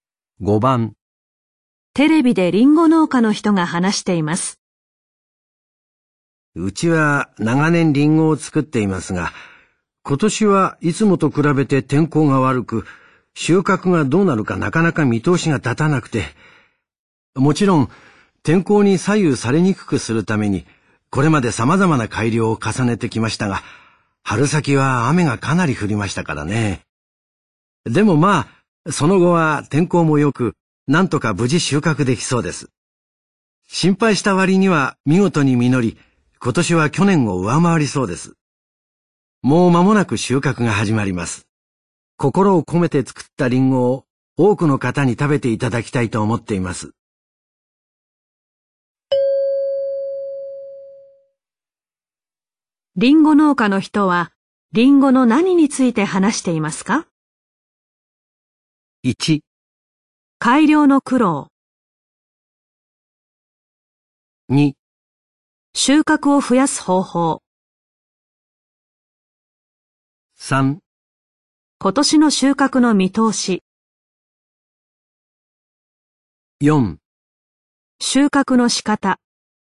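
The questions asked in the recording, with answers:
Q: リンゴ農家の人は、リンゴの何について話していますか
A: 3: 今年の収穫の見通し。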